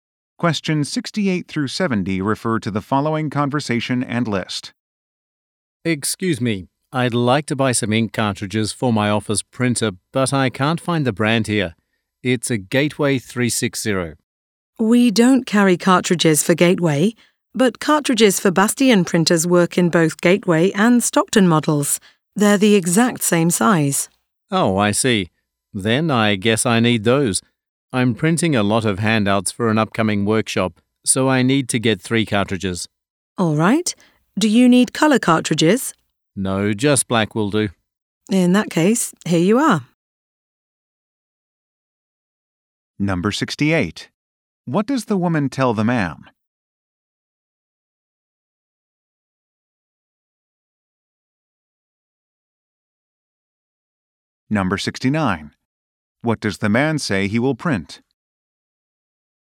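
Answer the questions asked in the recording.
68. Bastion cartridges work in Gateway printers
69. Handouts for a workshop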